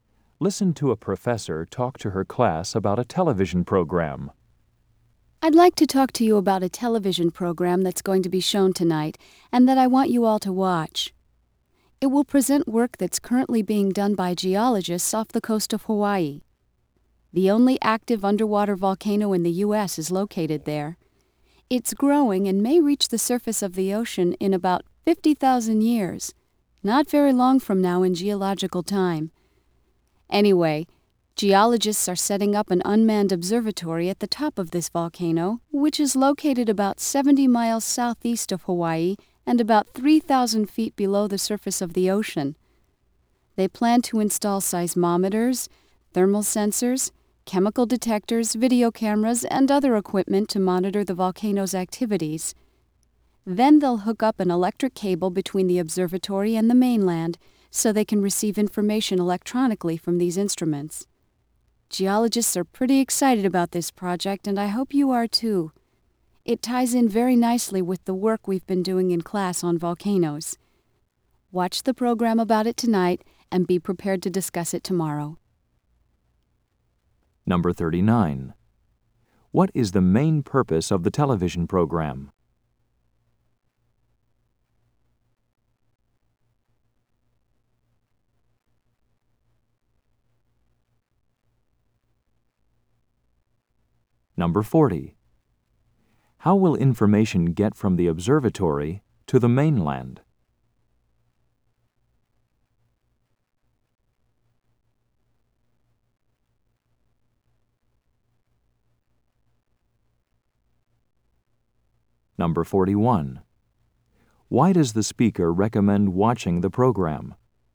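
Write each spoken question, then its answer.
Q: What is the main purpose of the television program?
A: To show geologists' work setting up an observatory on an underwater volcano off Hawaii

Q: How will information get from the observatory to the mainland?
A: Electronically through an electric cable

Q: Why does the speaker recommend watching the program?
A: It ties in with the class work on volcanoes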